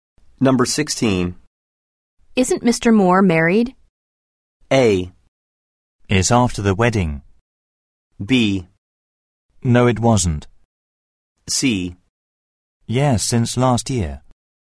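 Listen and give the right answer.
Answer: C: Yes, since last year.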